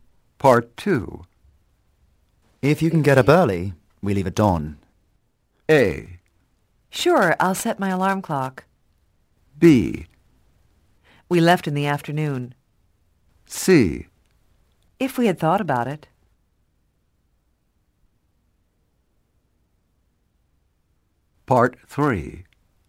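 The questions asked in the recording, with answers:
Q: If you can get up early, we leave at dawn.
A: A: Sure, I'll set my alarm clock.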